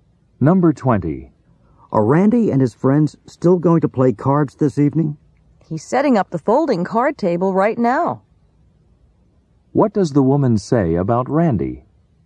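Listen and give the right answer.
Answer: He is still going to play cards; he's setting up the table now.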